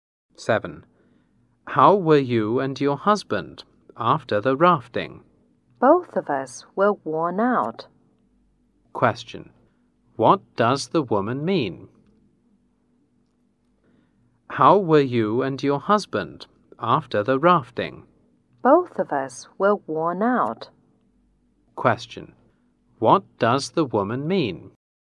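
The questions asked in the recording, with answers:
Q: What does the woman mean?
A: She and her husband were both very tired.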